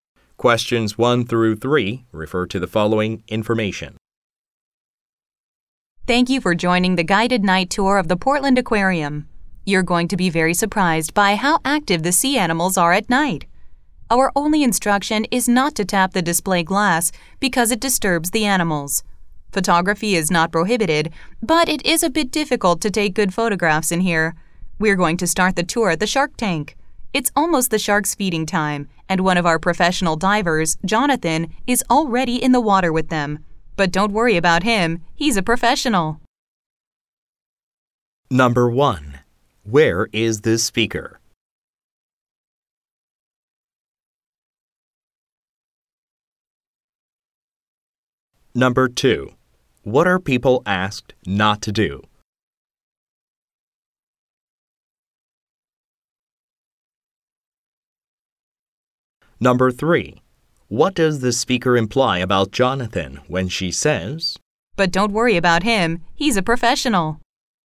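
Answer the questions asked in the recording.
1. At the Portland Aquarium
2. Tap the display glass
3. He is safe with the sharks because he is experienced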